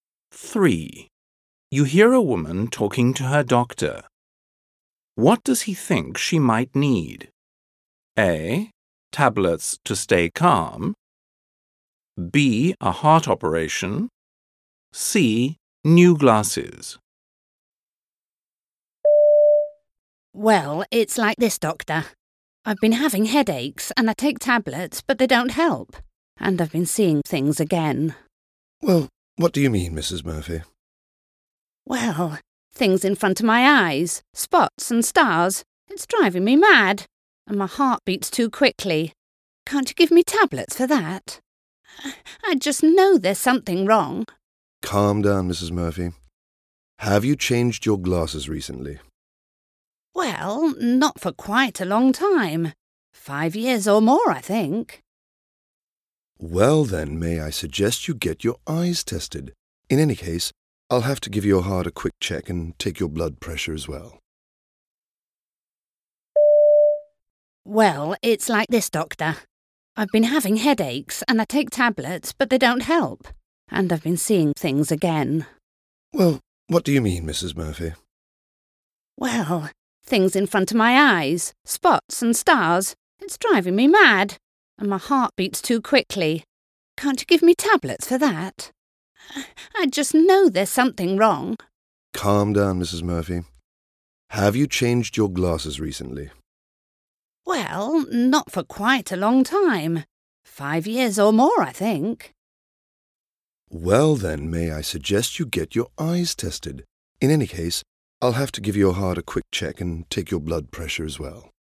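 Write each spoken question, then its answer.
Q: What does he think she might need?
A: C: New glasses.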